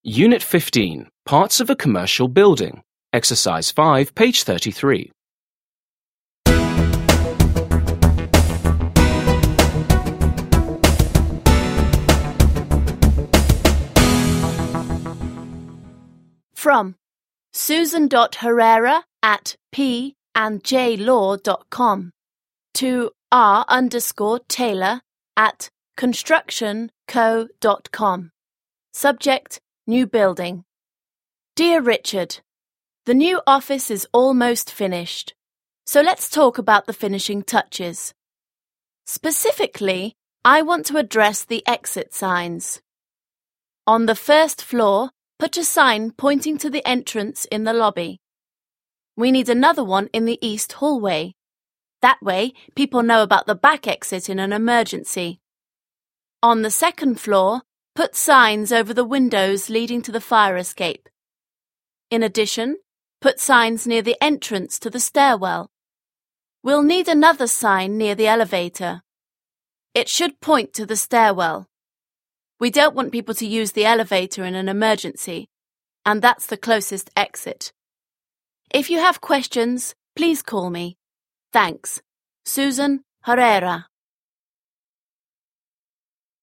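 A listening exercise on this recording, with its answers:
5. Listen and read the email to a construction company manager again. What kind of sign is needed near an elevator?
What kind of sign is needed near an elevator?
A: A sign pointing to the stairwell

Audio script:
Unit 15. Parts of a commercial building.
Dear Richard,
The new office is almost finished. So let's talk about the finishing touches. Specifically, I want to address the exit signs.
On the first floor, put a sign pointing to the entrance in the lobby. We need another one in the east hallway. That way, people know about the back exit in an emergency. On the second floor, put signs over the windows leading to the fire escape. In addition, put signs near the entrance to the stairwell. We'll need another sign near the elevator. It should point to the stairwell. We don't want people to use the elevator in an emergency, and that's the closest exit if you have questions, please call me.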